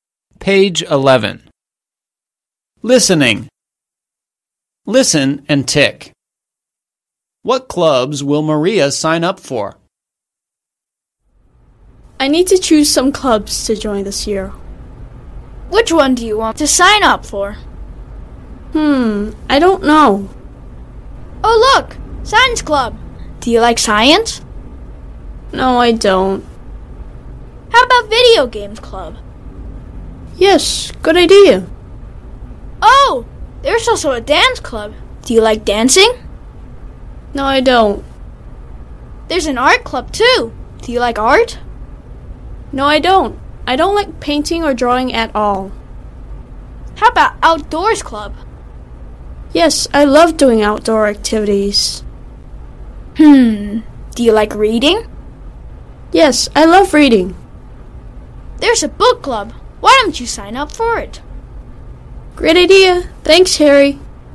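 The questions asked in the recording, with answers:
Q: What clubs will Maria sign up for?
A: Video Games Club, Outdoors Club and Book Club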